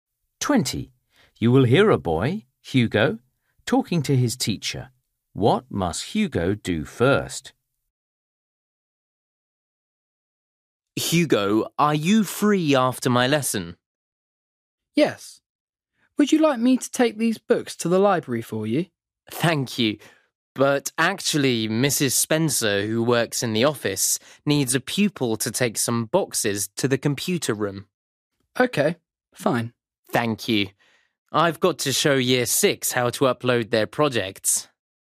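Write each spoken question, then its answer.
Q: What must Hugo do first?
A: Take some boxes to the computer room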